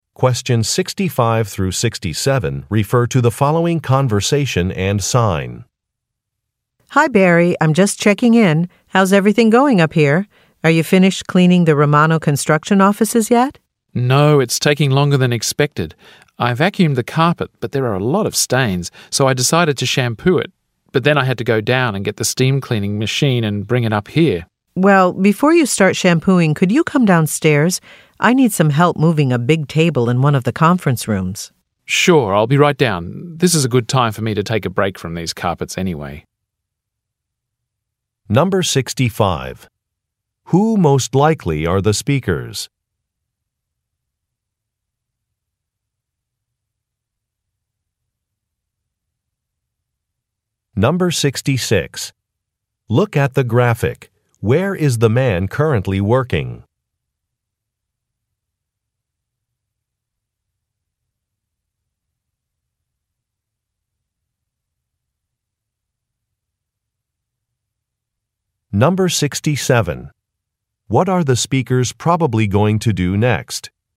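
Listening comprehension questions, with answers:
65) Who most likely are the speakers?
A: Cleaning staff

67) What are the speakers probably going to do next?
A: Move a table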